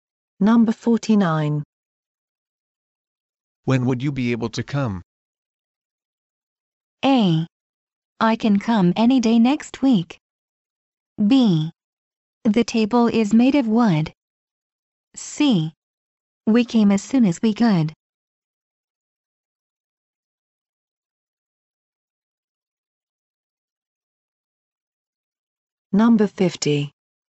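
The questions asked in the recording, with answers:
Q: When would you be able to come?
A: A: I can come any day next week.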